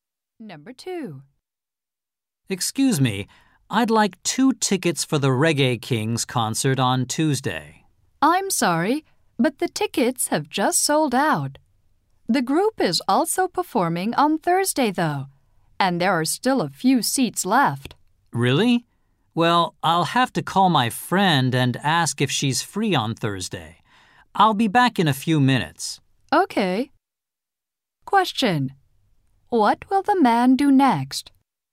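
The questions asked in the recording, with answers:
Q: What will the man do next?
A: Call his friend to ask if she is free on Thursday.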